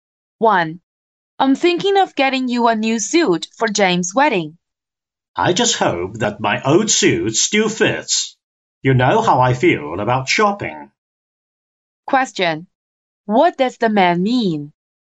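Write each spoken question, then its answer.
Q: What does the man mean?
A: He doesn't want to go shopping for a new suit; he hopes his old suit still fits.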